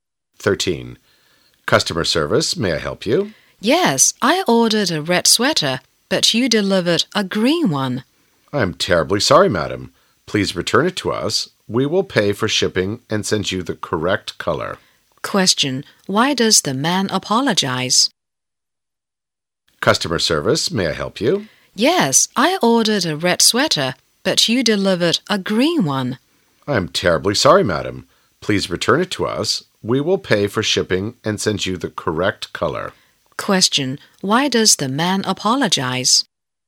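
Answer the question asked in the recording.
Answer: Because they delivered a green sweater instead of the red one she ordered.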